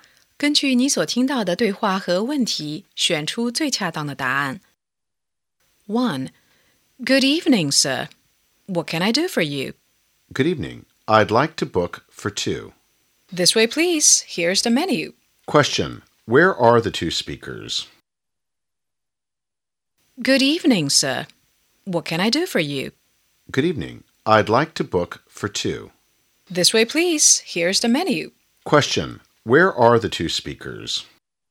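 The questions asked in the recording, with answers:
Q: Question. Where are the two speakers?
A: In a restaurant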